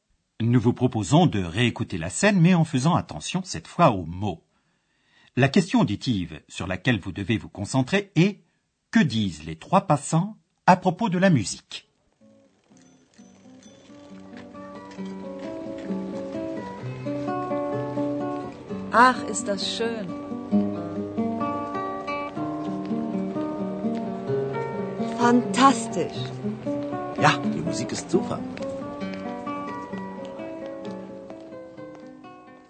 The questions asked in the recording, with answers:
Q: Que disent les trois passants à propos de la musique ?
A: Les trois passants sont ravis de la musique.